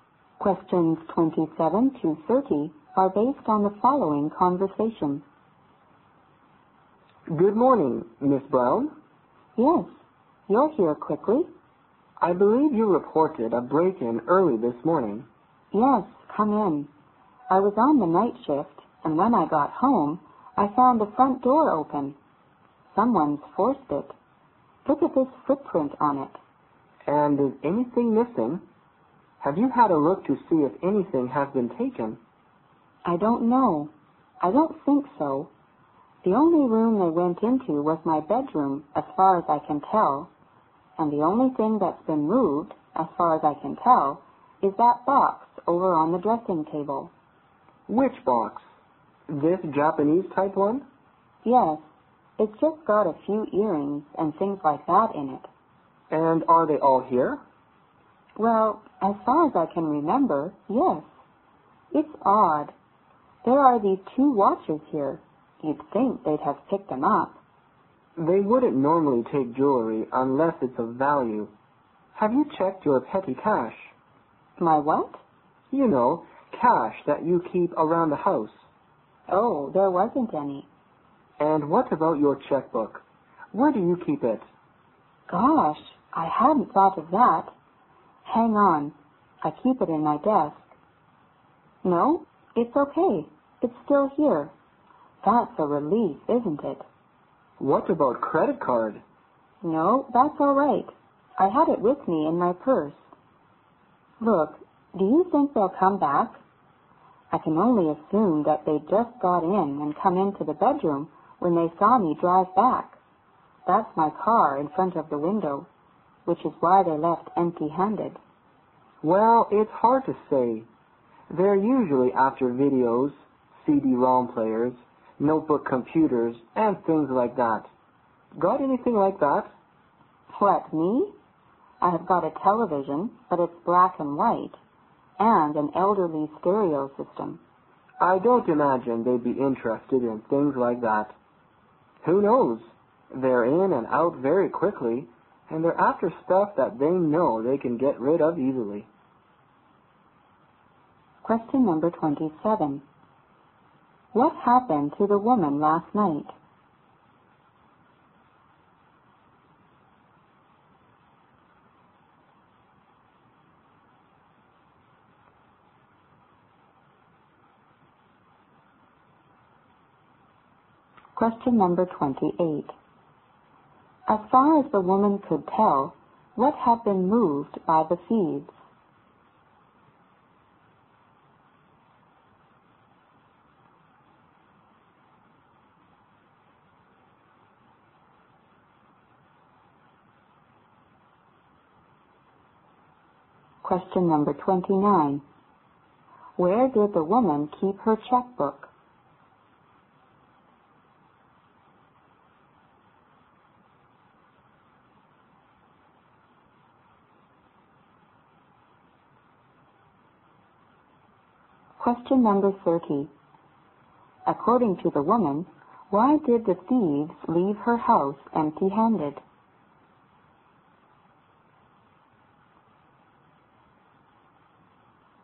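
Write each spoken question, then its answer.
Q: What happened to the woman last night?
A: Her house was broken into

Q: As far as the woman could tell, what had been moved by the thieves?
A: The box on her dressing table

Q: Where did the woman keep her checkbook?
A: In her desk

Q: According to the woman, why did the thieves leave her house empty-handed?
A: They saw her drive back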